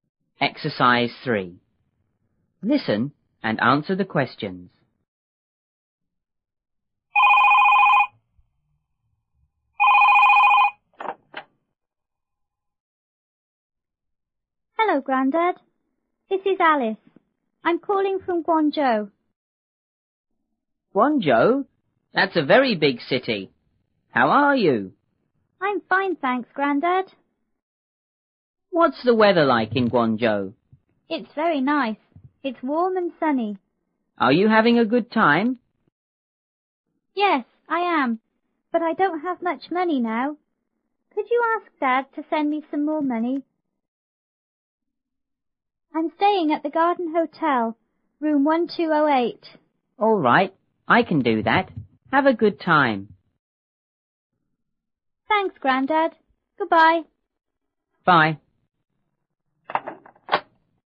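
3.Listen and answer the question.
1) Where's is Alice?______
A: In Guangzhou

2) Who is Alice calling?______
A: Her grandad

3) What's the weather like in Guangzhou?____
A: Warm and sunny

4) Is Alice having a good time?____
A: Yes, she is

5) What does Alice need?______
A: Some more money

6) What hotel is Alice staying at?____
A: The Garden Hotel

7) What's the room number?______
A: 1208

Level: 六年级下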